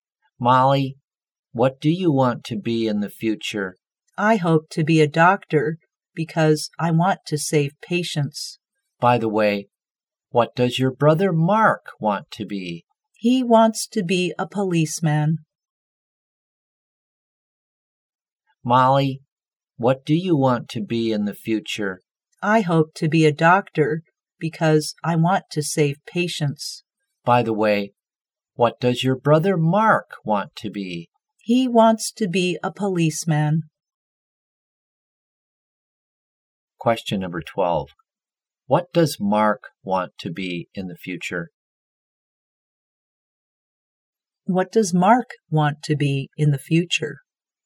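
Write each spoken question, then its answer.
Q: What does Mark want to be in the future?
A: A policeman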